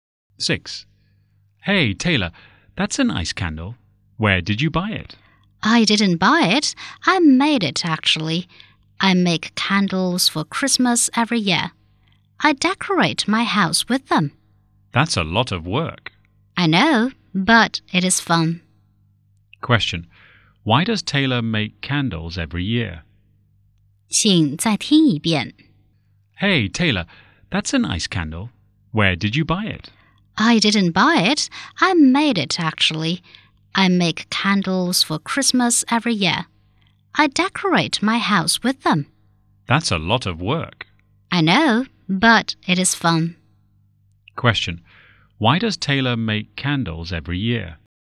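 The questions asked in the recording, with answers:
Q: Why does Taylor make candles every year?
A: To decorate her house for Christmas.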